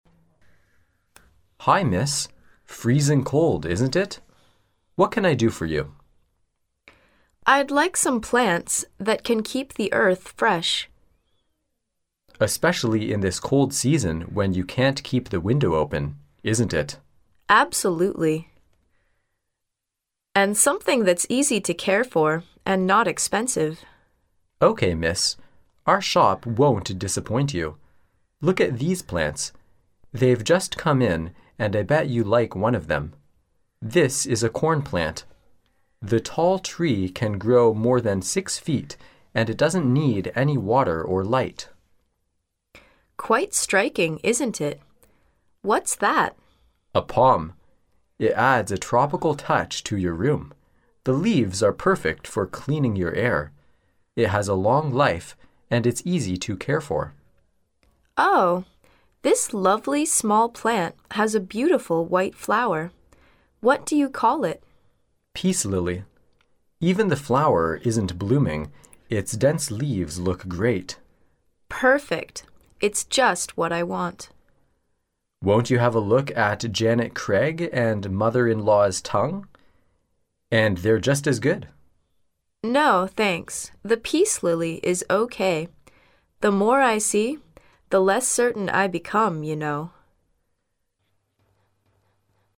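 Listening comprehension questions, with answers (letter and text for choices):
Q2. Which of the following plants can add a tropical touch to a room?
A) Palm.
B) Peace Lily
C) Corn Plant.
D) Janet Craig.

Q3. Which of the following plants will the woman probably buy in the end?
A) Corn Plant.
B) Janet Craig.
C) Peace Lily.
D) Mother-in-Law's Tongue.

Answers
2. A) Palm.
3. C) Peace Lily.

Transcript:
[听力原文]11-13 M: Hi, Miss. Freezing cold, isn't it? What can I do for you? W: I'd like some plants that can keep the earth fresh. M: Especially in this cold season when you can't keep die window open, isn't it? W: Absolutely. And something that's easy to care for and not expensive. Our shop won't disappoint you. Look at these plants. They've just come in and I bet you like one of them. This is a corn plant. The tall tree can grow more than six feet and it doesn't need any water or light. W: Quite striking, isn't it? 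What's that? M: A palm. It adds a tropical touch to your room. The leaves are perfect for cleaning your air. It has a long life and it's easy to care for. W: Oh, this lovely small plant has beautiful white flower. What do you call it? M: Peace lily. Even the flower isn't blooming, its dense leaves look great. W: Perfect. It's just what I want. M: Won't you have a look at Janet Craig and Mother - in - Law's Tongue? And they're just as good. M: No, thanks. The peace lily is OK. The more I see, the less certain I become, you know.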